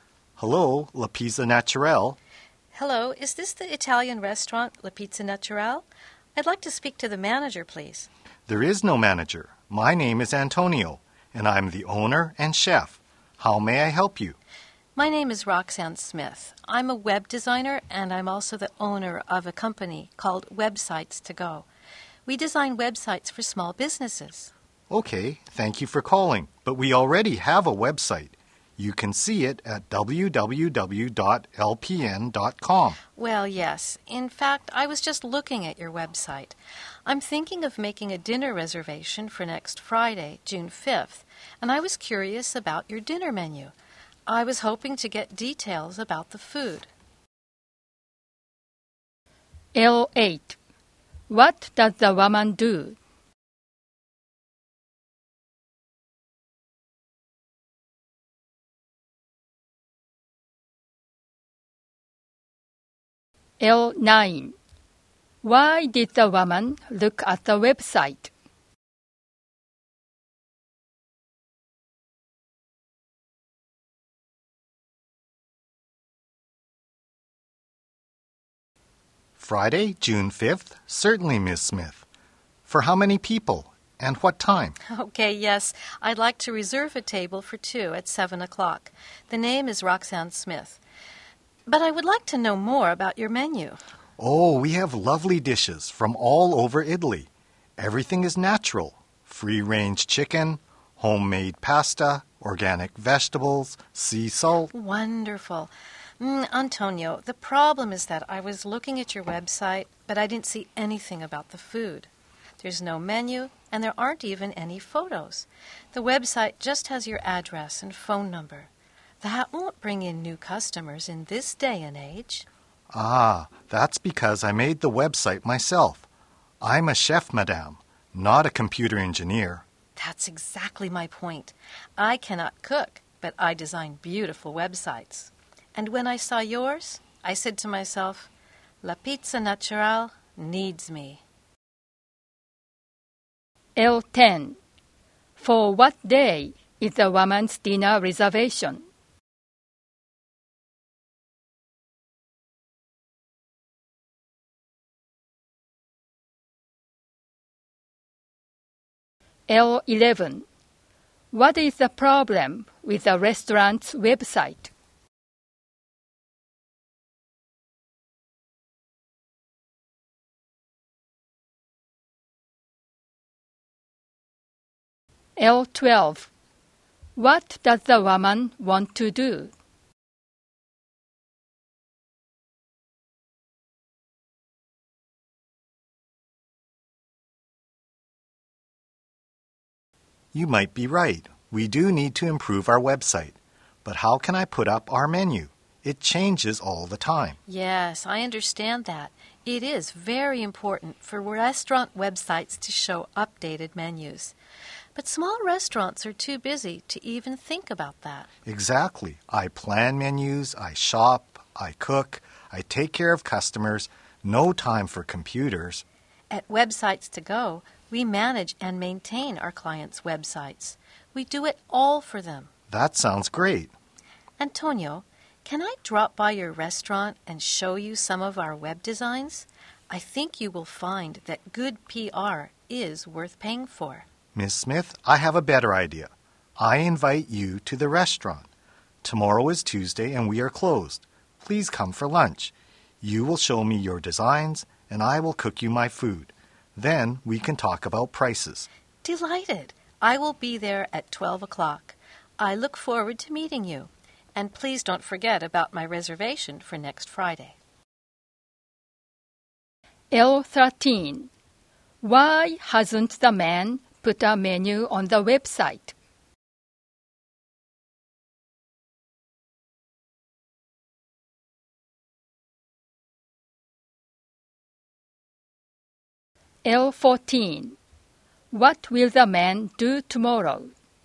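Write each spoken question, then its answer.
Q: What does the woman do?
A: She is a web designer and owns a company

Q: Why did the woman look at the website?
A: To get details about the dinner menu before making a reservation

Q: For what day is the woman's dinner reservation?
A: Friday, June 5th

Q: What is the problem with the restaurant's website?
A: It has no menu and no photos, only the address and phone number

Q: What does the woman want to do?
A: Design a new website for the restaurant

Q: Why hasn't the man put a menu on the website?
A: His menu changes all the time and he has no time for computers

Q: What will the man do tomorrow?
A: Cook the woman lunch at his restaurant and look at her designs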